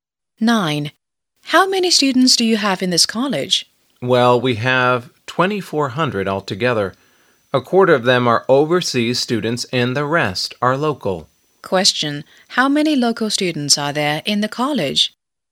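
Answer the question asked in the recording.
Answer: 1,800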